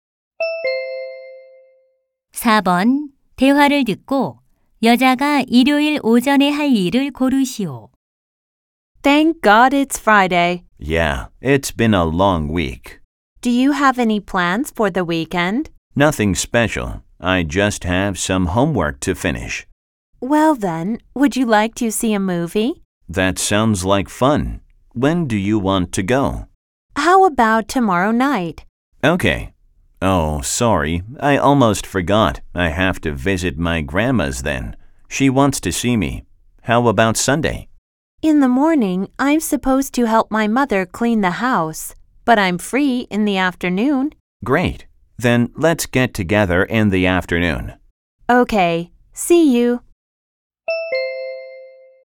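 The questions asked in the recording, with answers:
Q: 대화를 듣고 여자가 일요일 오전에 할 일을 고르시오.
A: 엄마의 집 청소 돕기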